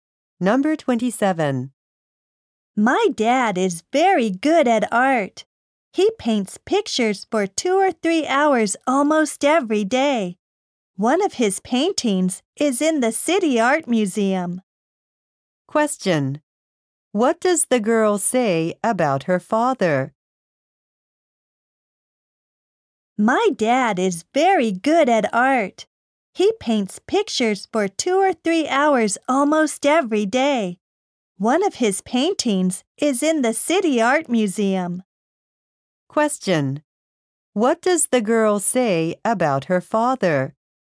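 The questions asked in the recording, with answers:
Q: What does the girl say about her father?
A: He is very good at art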